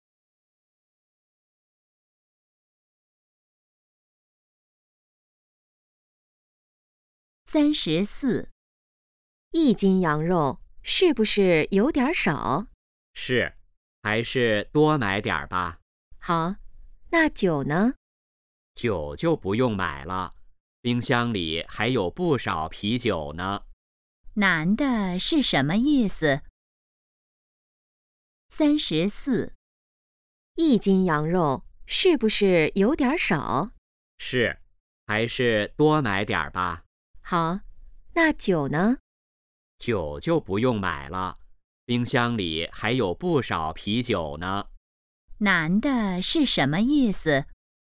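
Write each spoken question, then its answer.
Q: 男的是什么意思?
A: 不用买酒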